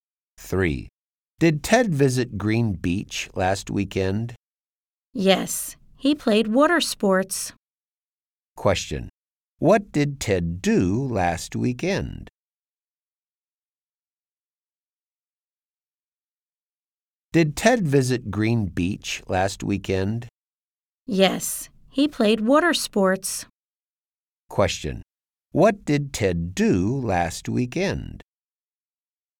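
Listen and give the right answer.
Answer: He played water sports at Green Beach.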